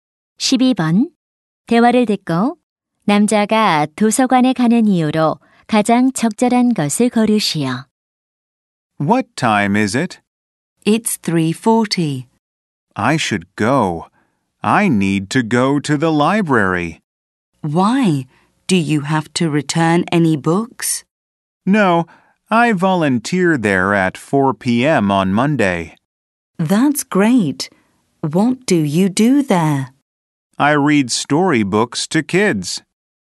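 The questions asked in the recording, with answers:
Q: 대화를 듣고 남자가 도서관에 가는 이유로 가장 적절한 것을 고르시오.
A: 자원봉사(아이들에게 동화책 읽어주기)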